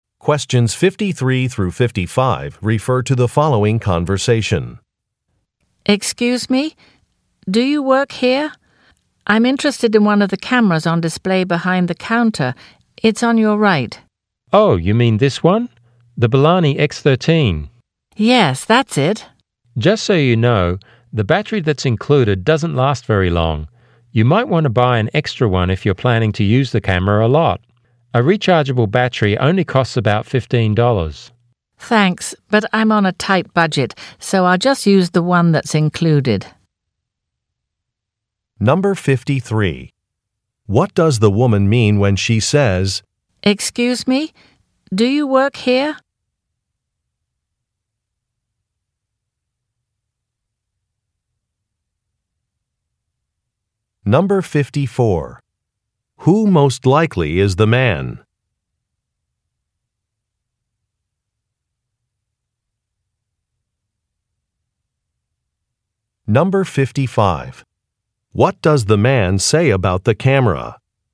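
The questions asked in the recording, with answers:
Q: What does the woman mean when she says, Excuse me, do you work here?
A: She wants help from a store employee

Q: Who most likely is the man?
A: A store salesclerk

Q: What does the man say about the camera?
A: Its included battery doesn't last very long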